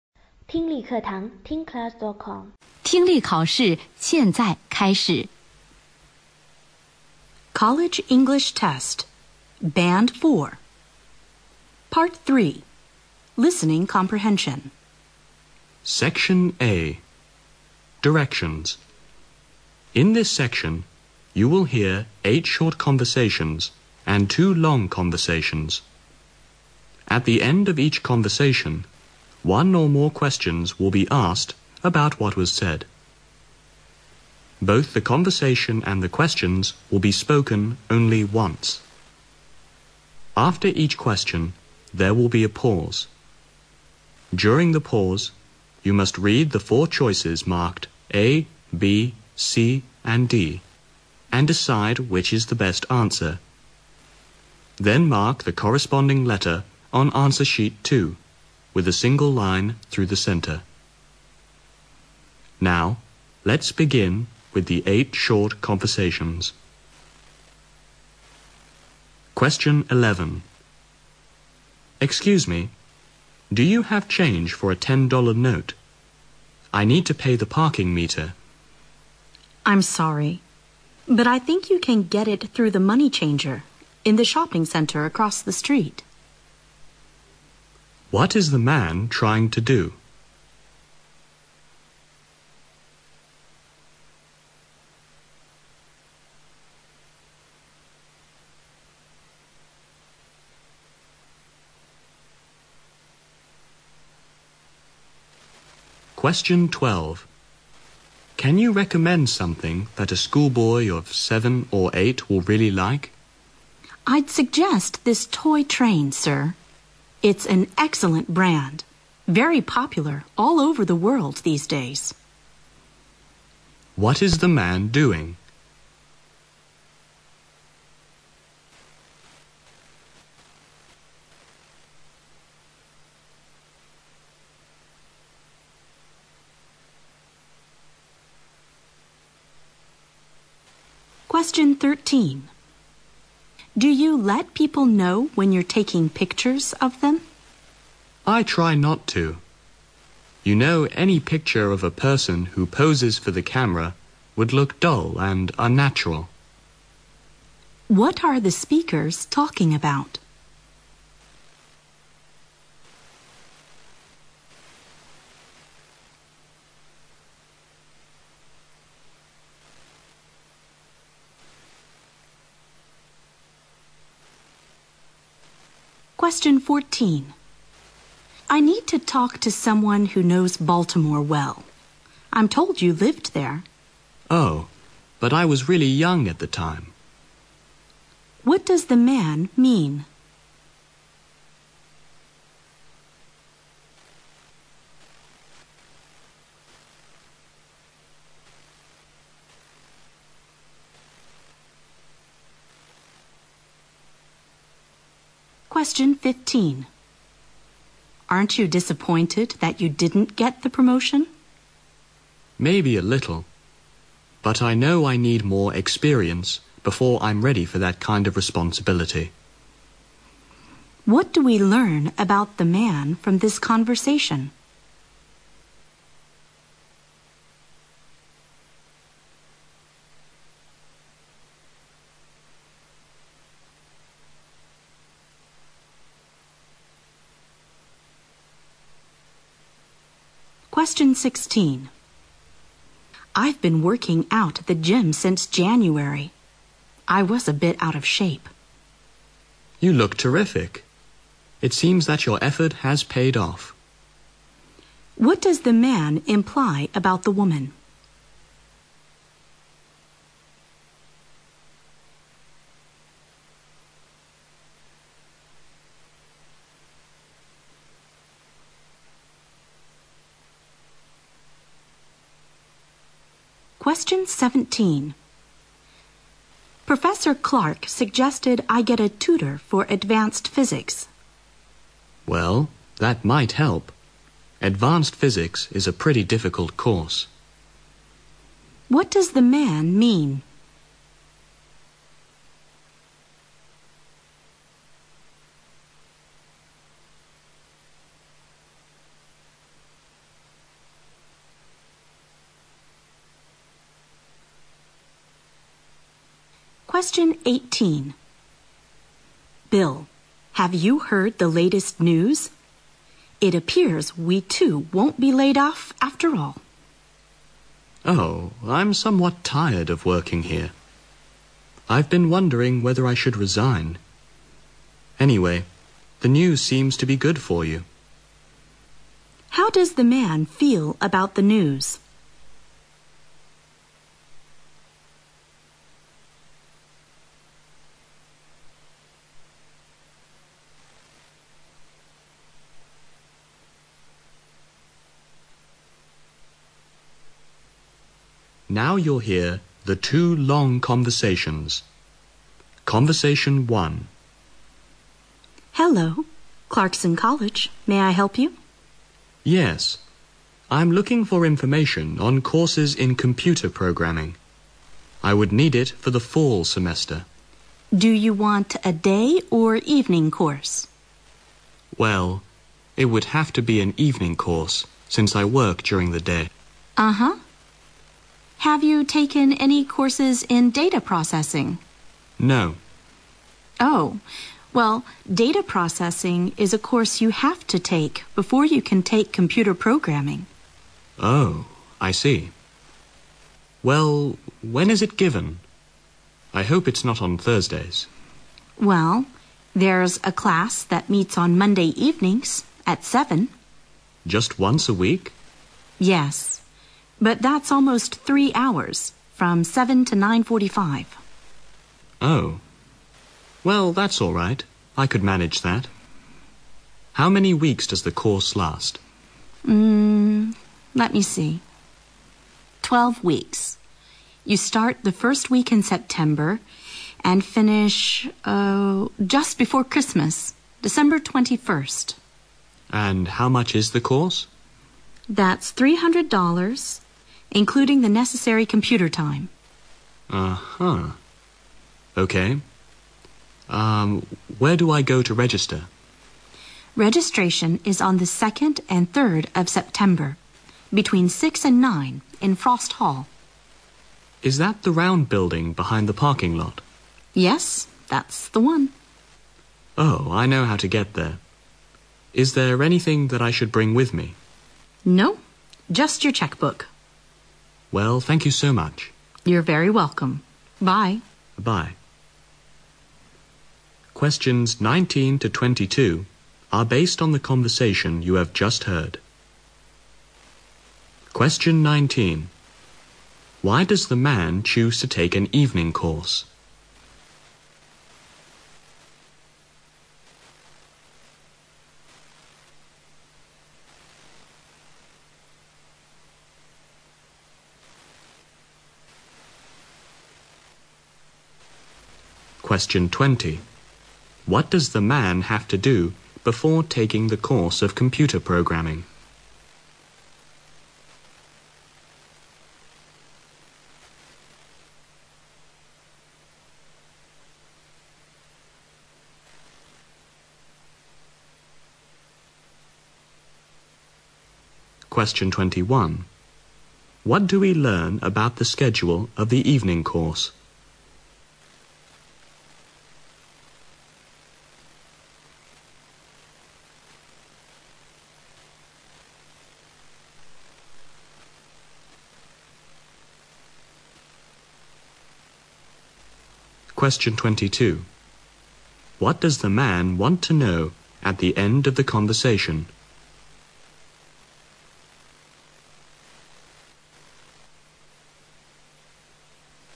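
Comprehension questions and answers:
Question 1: What is the man trying to do?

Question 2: What is the man doing?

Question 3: What are the speakers talking about?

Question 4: What do we learn about the man from this conversation?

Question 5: What does the man imply about the woman?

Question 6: How does the man feel about the news?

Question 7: Why does the man choose to take an evening course?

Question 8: What does the man have to do before taking the course of computer programming?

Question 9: What do we learn about the schedule of evening course?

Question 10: What does the man want to know at the end of the conversation?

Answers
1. Get change for a ten-dollar note to pay the parking meter.
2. Buying a toy for a schoolboy of 7 or 8.
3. Taking pictures of people.
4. He knows he needs more experience before taking on that responsibility.
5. She is in good shape now thanks to working out.
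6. Indifferent; he is thinking of resigning anyway.
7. He works during the day.
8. Take a course in data processing.
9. It meets once a week, Monday evenings from 7 to 9:45, for 12 weeks.
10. Whether he should bring anything with him to register.

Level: 大学英语四级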